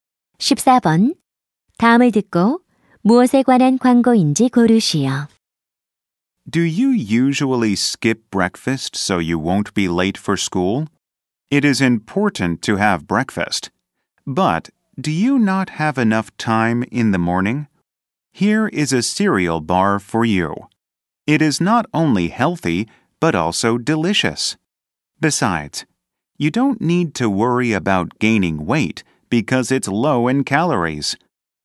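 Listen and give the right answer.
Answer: 시리얼 바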